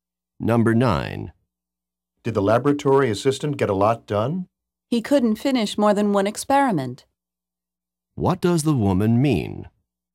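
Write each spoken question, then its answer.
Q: What does the woman mean?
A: The assistant did not get much done; he finished only one experiment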